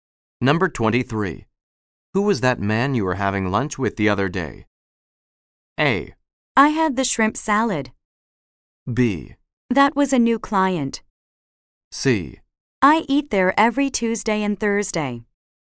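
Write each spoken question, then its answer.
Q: Who was that man you were having lunch with the other day?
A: B: That was a new client.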